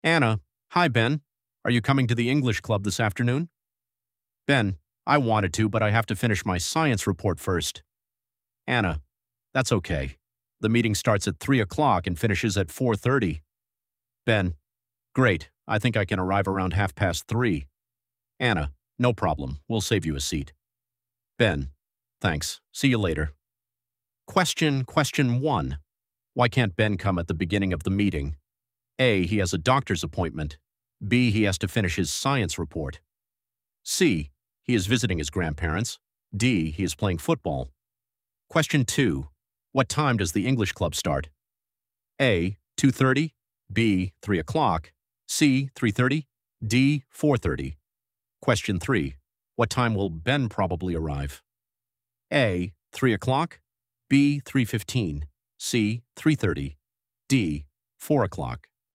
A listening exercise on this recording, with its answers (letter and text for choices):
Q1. Why can't Ben come at the beginning of the meeting?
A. He has a doctor's appointment.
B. He has to finish his science report.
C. He is visiting his grandparents.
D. He is playing football.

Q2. What time does the English club start?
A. 2:30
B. 3:00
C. 3:30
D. 4:30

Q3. What time will Ben probably arrive?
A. 3:00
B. 3:15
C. 3:30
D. 4:00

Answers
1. B. He has to finish his science report.
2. B. 3:00
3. C. 3:30

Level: B2